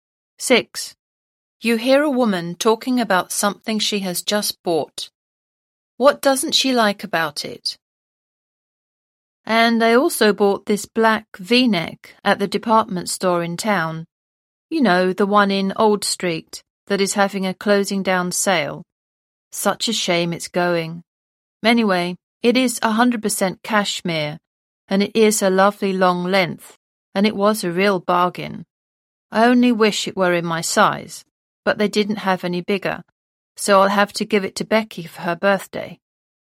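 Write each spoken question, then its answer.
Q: What doesn't she like about it?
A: It's too small for her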